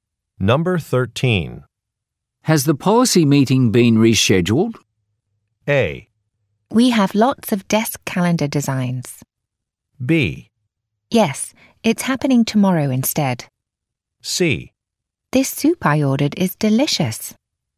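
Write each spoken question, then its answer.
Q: Has the policy meeting been rescheduled?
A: B: Yes, it's happening tomorrow instead.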